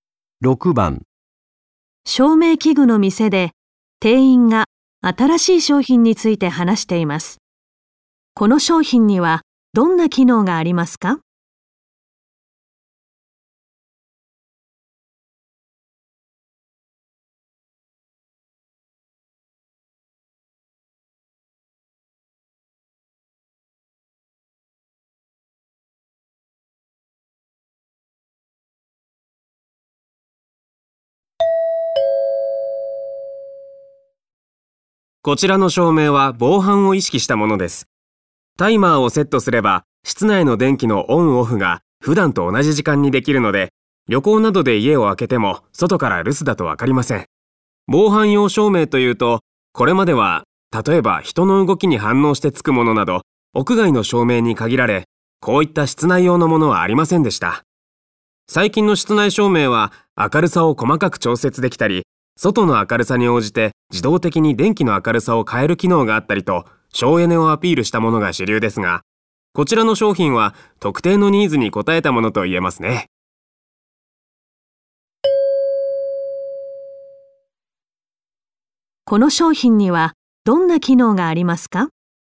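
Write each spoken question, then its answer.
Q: この商品にはどんな機能がありますか?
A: タイマーで室内の電気を普段と同じ時間にオンオフでき、留守だと分からないようにする機能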